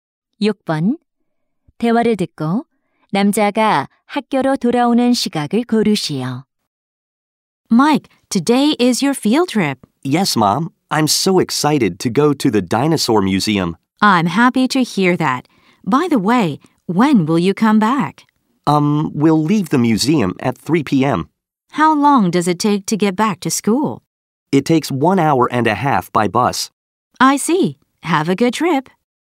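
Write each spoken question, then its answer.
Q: 대화를 듣고 남자가 학교로 돌아오는 시각을 고르시오.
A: 오후 4시 30분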